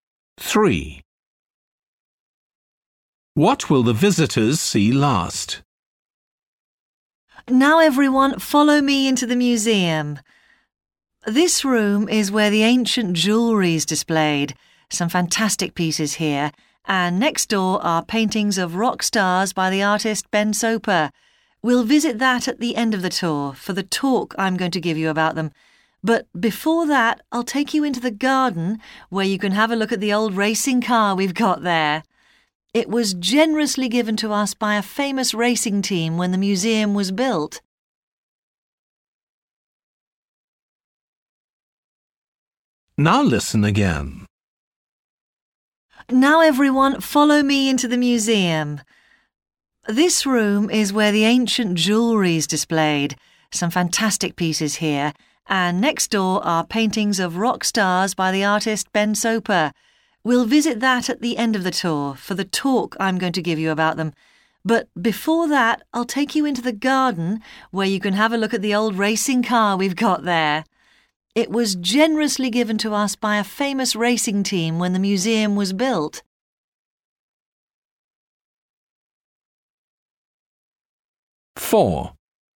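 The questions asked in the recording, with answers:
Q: What will the visitors see last?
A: paintings of rock stars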